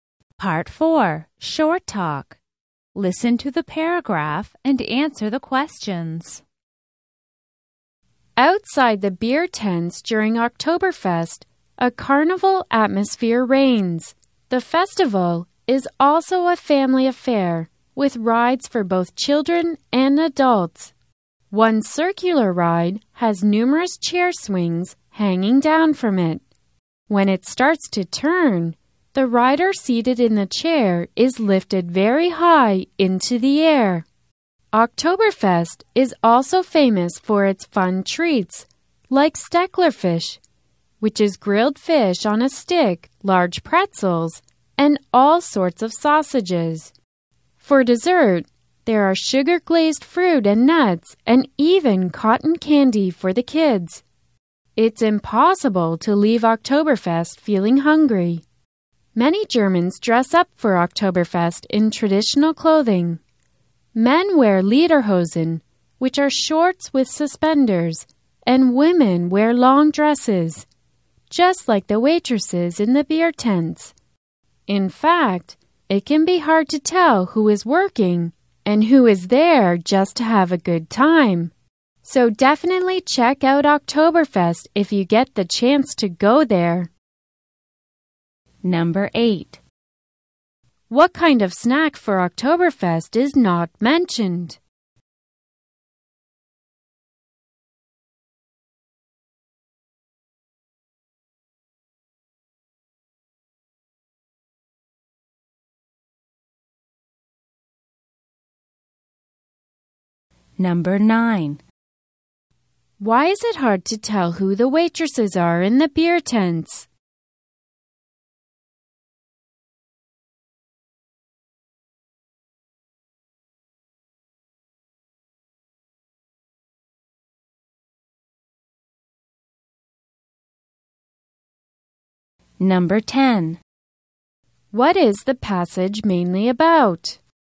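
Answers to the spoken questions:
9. Many women wear long traditional dresses just like the waitresses
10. Oktoberfest's attractions: rides, food and traditional clothing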